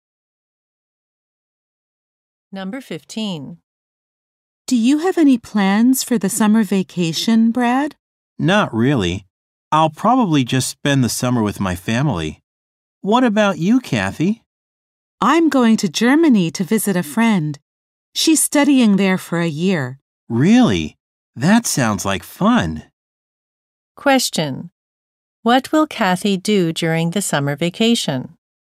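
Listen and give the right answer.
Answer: Visit a friend in Germany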